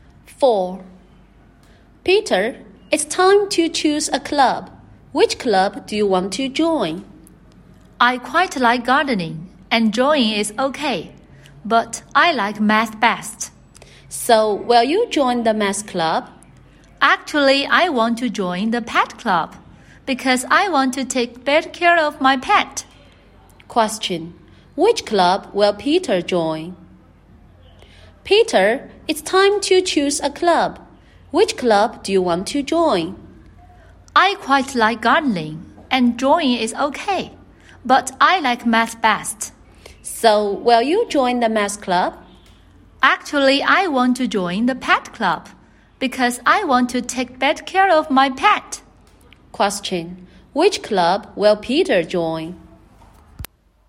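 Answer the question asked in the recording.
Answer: The pet club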